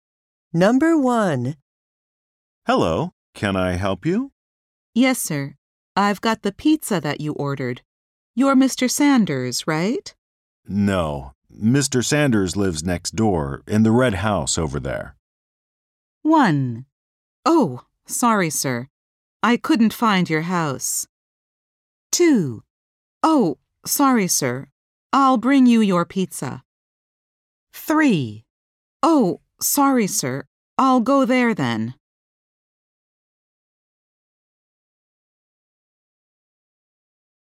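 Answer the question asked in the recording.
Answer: Oh, sorry, sir. I'll go there then.

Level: 英検準2級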